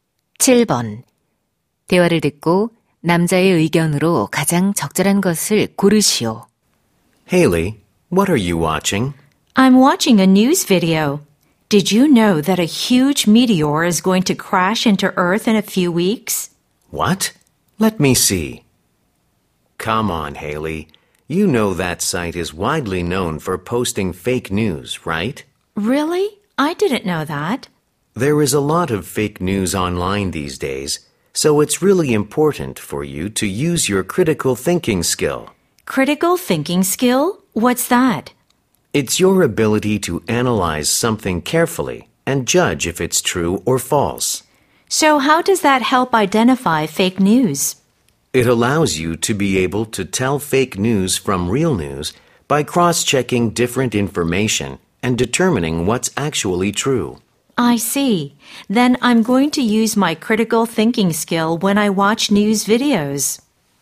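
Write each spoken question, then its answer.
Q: 대화를 듣고 남자의 의견으로 가장 적절한 것을 고르시오.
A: 가짜 뉴스를 판별하려면 비판적 사고력을 사용해야 한다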